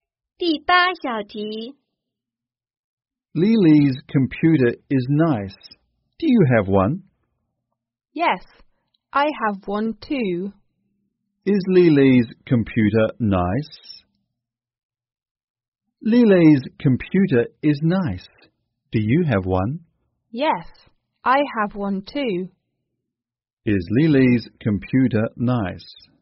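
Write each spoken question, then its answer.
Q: Is Lily's computer nice?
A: Yes, it is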